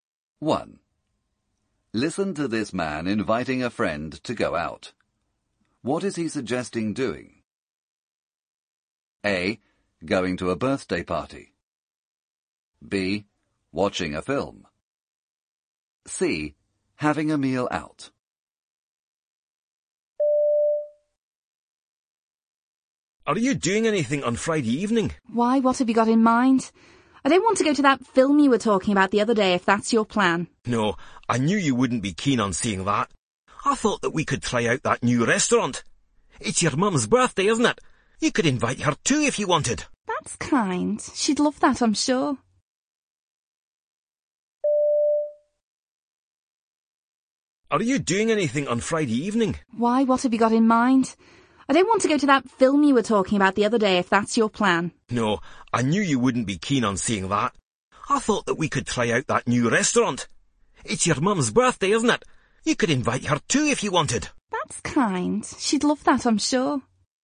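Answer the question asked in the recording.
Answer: C: Having a meal out.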